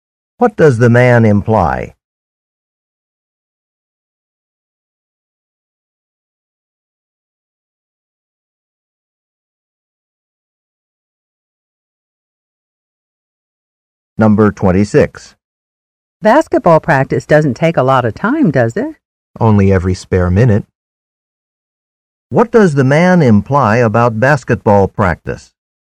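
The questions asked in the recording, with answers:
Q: What does the man imply about basketball practice?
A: It takes a lot of time.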